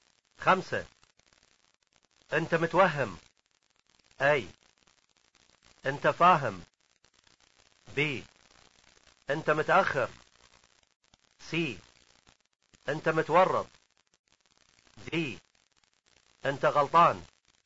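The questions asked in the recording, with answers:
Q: انت متوهم.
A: D: انت غلطان.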